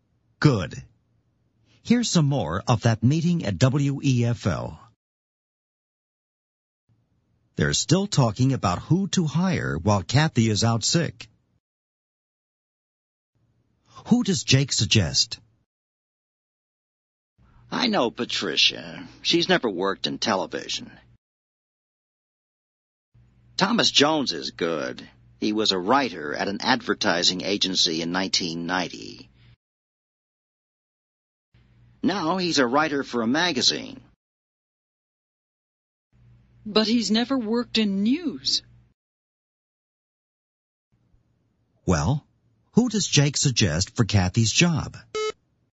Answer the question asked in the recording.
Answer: Thomas Jones.